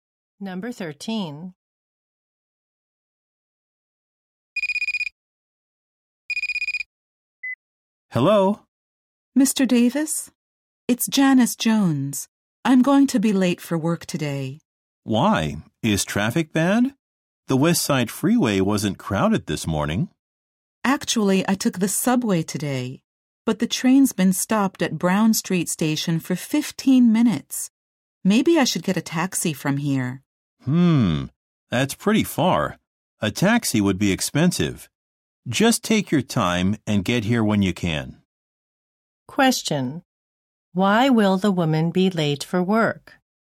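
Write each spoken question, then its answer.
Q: Why will the woman be late for work?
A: Her subway train has been stopped at Brown Street Station.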